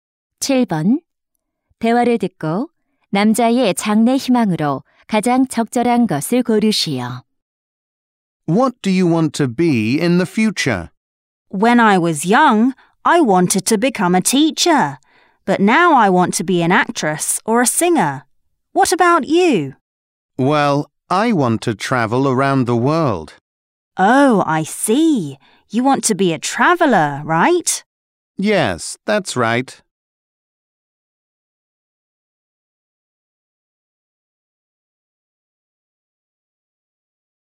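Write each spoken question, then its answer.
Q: 대화를 듣고 남자의 장래 희망으로 가장 적절한 것을 고르시오.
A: 여행가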